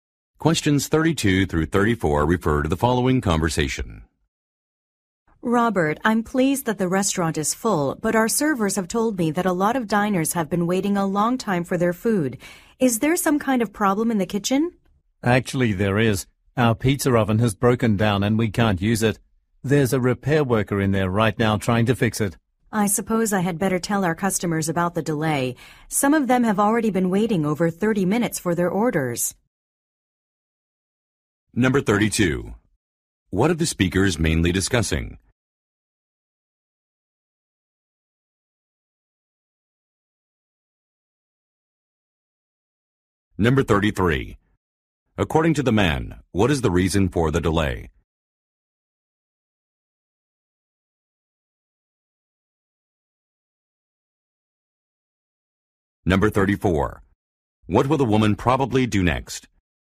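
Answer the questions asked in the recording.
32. Customers waiting a long time for their food
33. The pizza oven has broken down
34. Tell the customers about the delay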